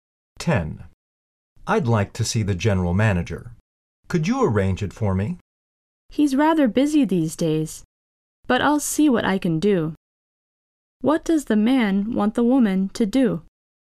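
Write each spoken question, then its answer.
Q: What does the man want the woman to do?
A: Arrange for him to see the general manager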